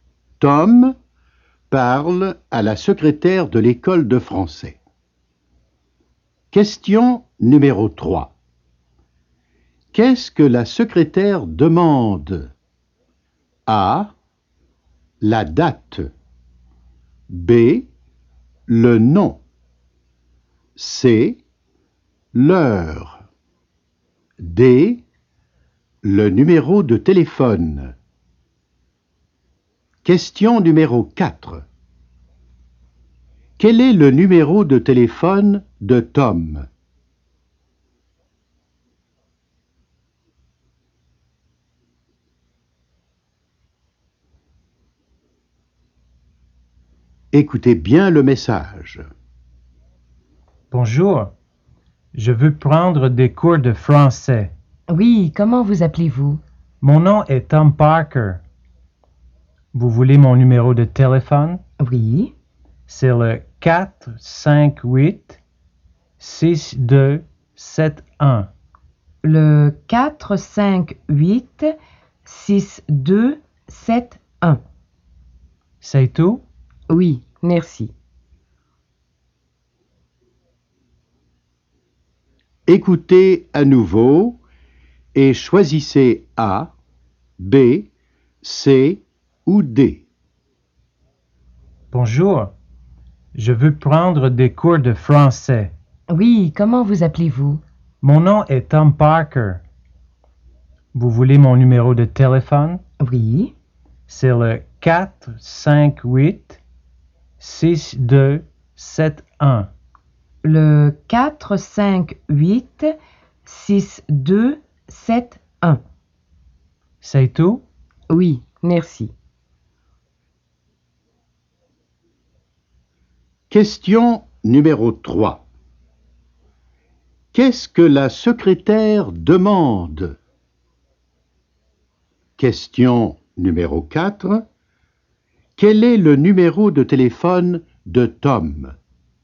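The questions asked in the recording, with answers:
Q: Qu'est-ce que la secrétaire demande?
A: B: Le nom.

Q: Quel est le numéro de téléphone de Tom ?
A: 458-6271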